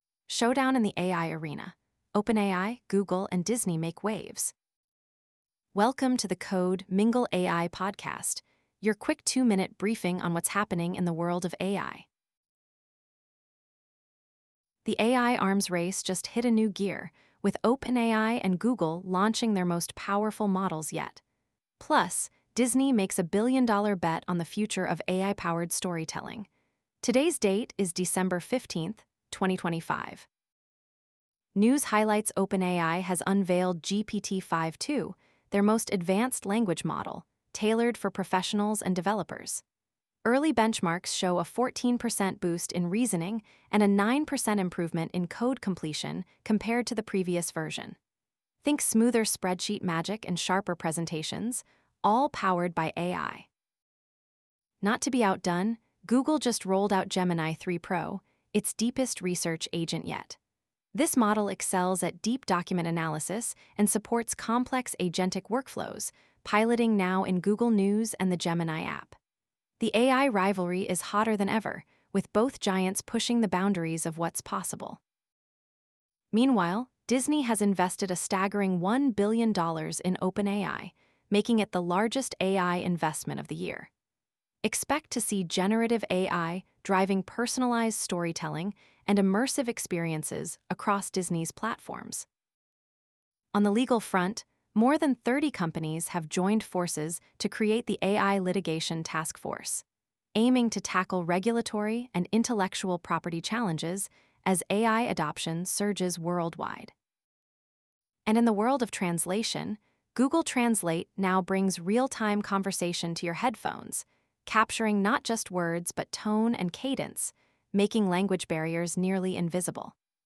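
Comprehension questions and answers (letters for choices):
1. What is a key feature of OpenAI's newly launched GPT-5.2 model?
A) It is primarily designed for image generation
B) It significantly improves spreadsheet generation and complex reasoning tasks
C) It is available to all enterprise users immediately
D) It focuses on real-time translation only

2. What major move did Disney make in the AI industry according to the news?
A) Launched its own AI language model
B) Invested $1 billion in OpenAI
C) Partnered with Google for AI research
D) Acquired a robotics startup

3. Which of the following best describes Google's Gemini 3 Pro?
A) A consumer-focused chatbot for entertainment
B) An advanced research agent with deep document analysis and agentic workflows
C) A hardware device for AI processing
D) A translation tool for real-time conversations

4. What industry response has emerged due to legal and regulatory tensions in AI?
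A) Formation of a global AI Ethics Board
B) Creation of an industry-wide AI Litigation Task Force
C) Mandatory government audits for all AI models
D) A moratorium on new AI releases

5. Which metric highlights the competitive edge of OpenAI's GPT-5.2 over its predecessor?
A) 20% faster image processing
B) 14% improvement in reasoning and 9% in code completion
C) 50% reduction in training data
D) 100 million new users in a week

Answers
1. B
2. B
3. B
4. B
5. B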